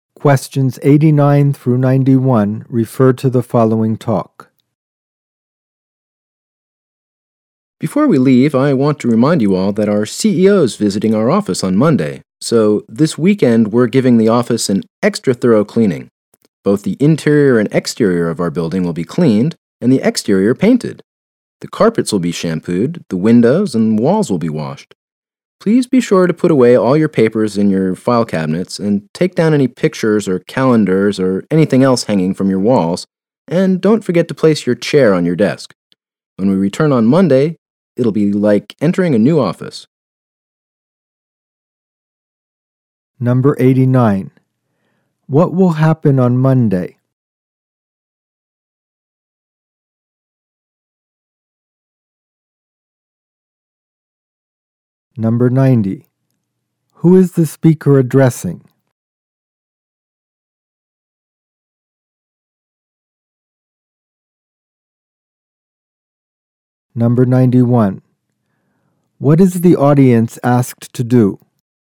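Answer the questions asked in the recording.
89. The CEO will visit the office.
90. Office employees.
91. Put away papers, take down wall items, and put chairs on desks.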